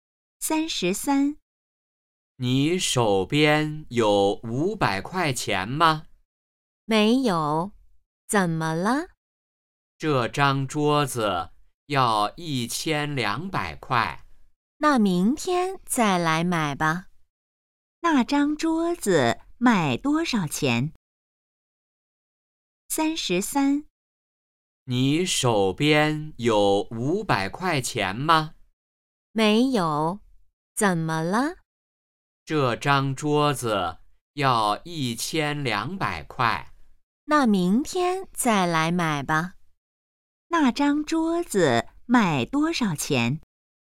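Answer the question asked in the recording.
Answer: 1200块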